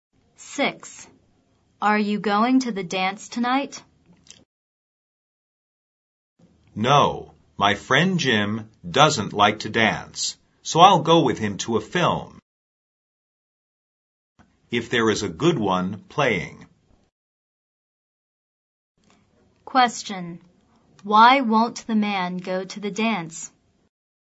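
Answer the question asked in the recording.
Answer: His friend Jim doesn't like to dance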